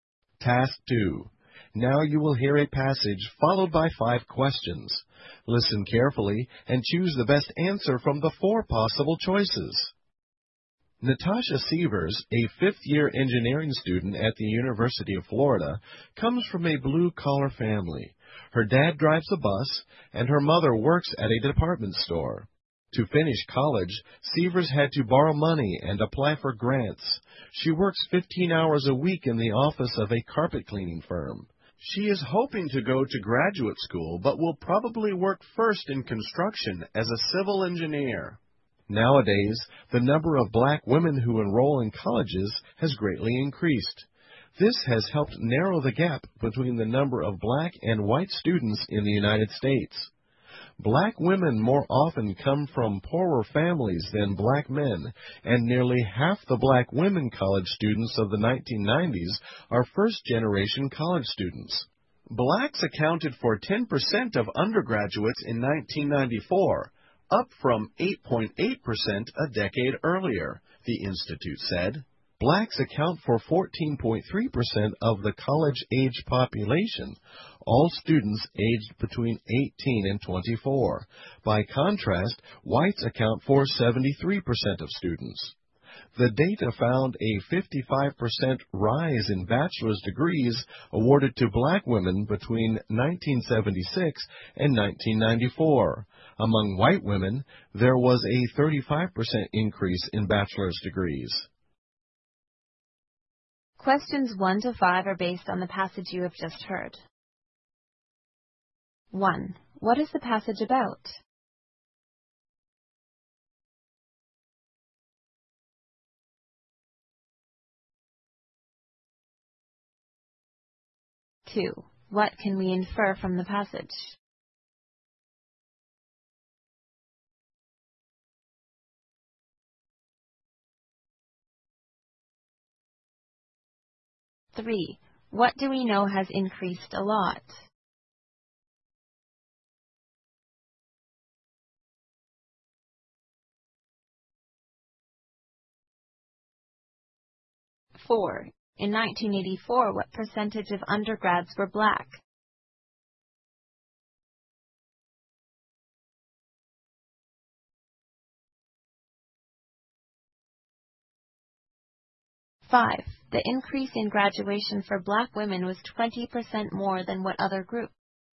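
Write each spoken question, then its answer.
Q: What do we know has increased a lot?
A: The number of black women enrolling in college.

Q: In 1984, what percentage of undergrads were black?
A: 8.8%.

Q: The increase in graduation for black women was 20% more than what other group?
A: White women.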